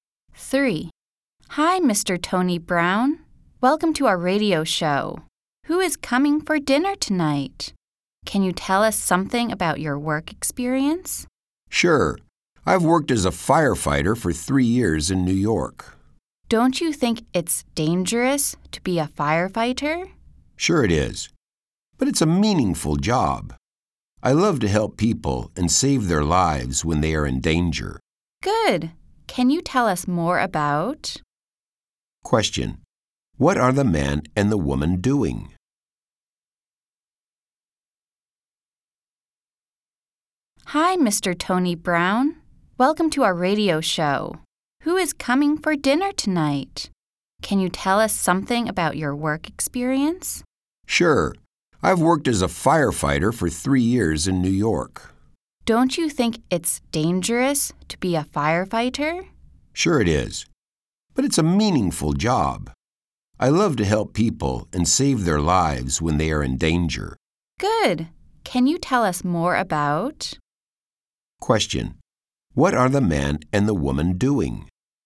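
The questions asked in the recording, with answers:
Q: What are the man and the woman doing?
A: Having an interview on a radio show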